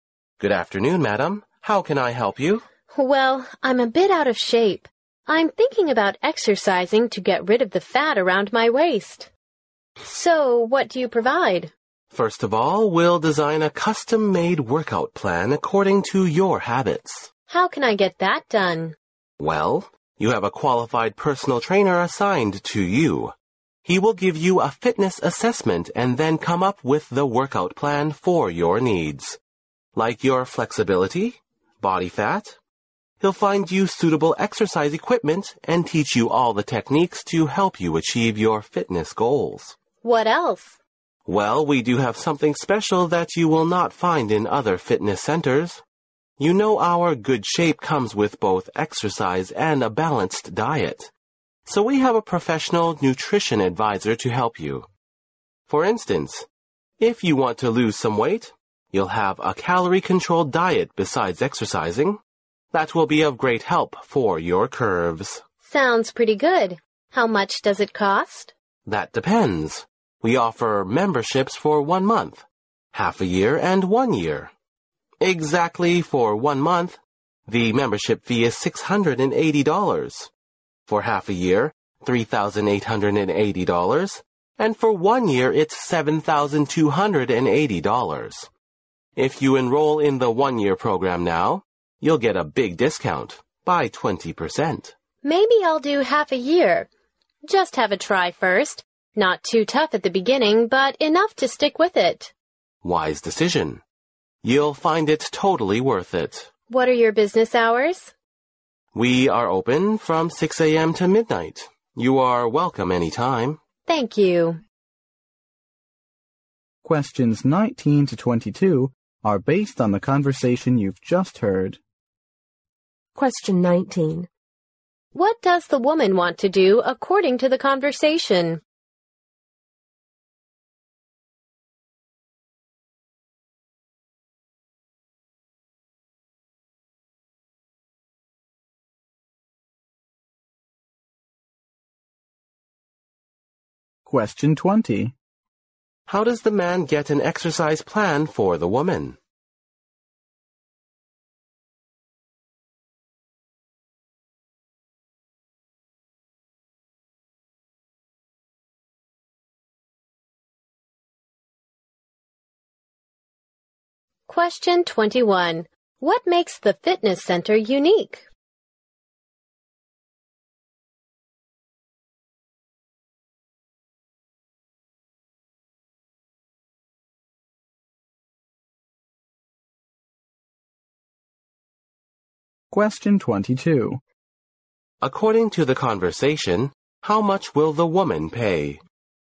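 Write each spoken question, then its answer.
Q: What does the woman want to do according to the conversation?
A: Exercise to lose the fat around her waist

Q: How does the man get an exercise plan for the woman?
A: A personal trainer gives her a fitness assessment and designs it

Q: What makes the fitness center unique?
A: A professional nutrition advisor

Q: According to the conversation, how much will the woman pay?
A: $3,880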